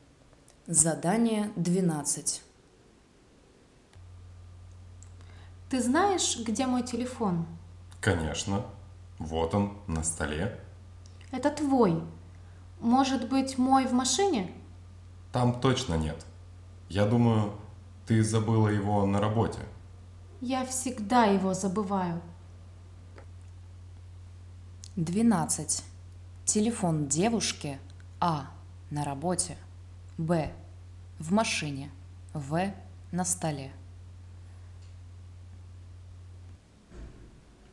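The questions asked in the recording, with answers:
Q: Телефон девушки. А. На работе. Б. В машине. В. На столе.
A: А: на работе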